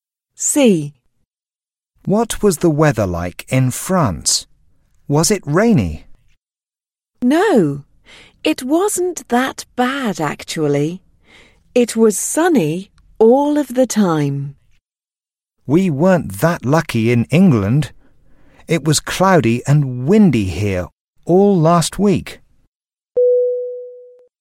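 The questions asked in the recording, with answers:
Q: What was the weather like in France?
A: sunny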